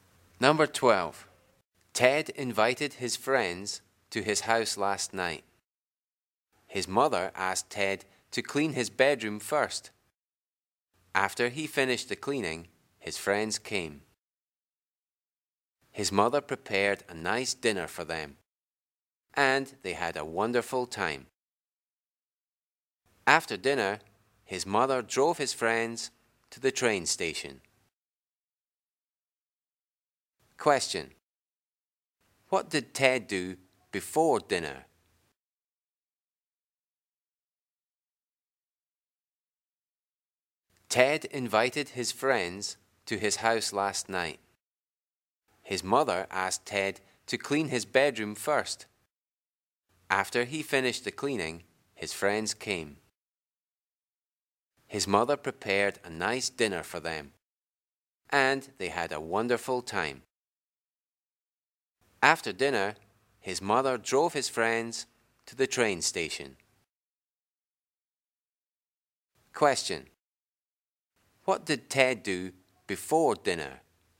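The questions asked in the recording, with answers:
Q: What did Ted do before dinner?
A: He cleaned his bedroom.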